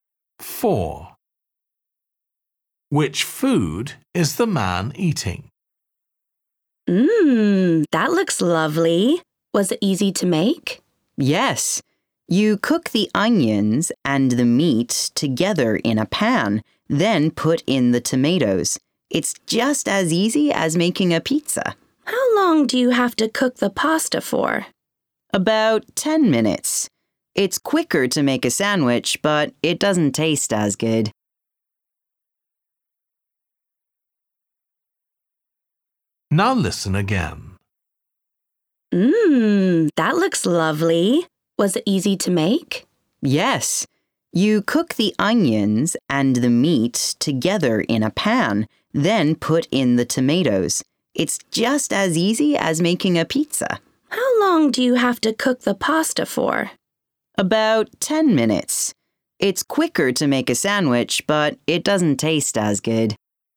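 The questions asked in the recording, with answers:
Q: Which food is the man eating?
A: pasta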